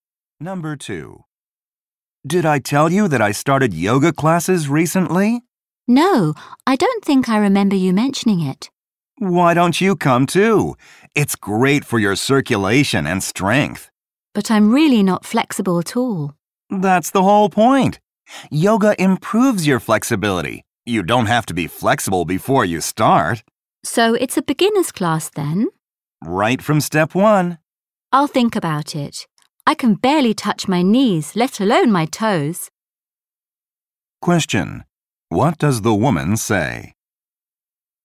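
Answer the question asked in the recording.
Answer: The yoga class is for beginners, so the man doesn't need to be flexible to join.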